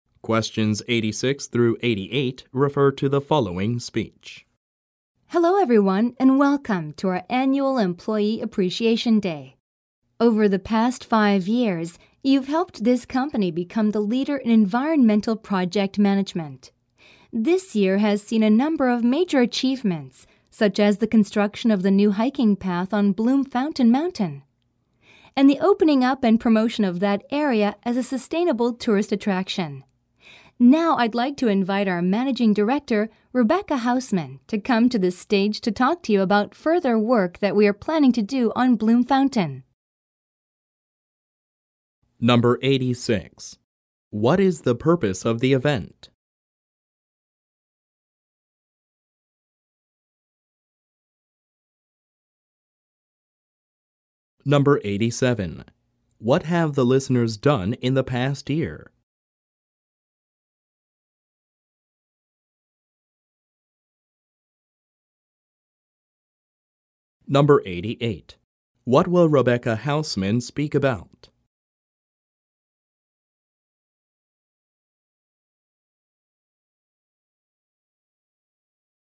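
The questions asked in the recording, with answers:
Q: What is the purpose of the event?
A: To show appreciation for employees

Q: What have the listeners done in the past year?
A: Built a new hiking path on Bloom Fountain Mountain and promoted the area as a sustainable tourist attraction

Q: What will Rebecca Hausman speak about?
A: Further work planned on Bloom Fountain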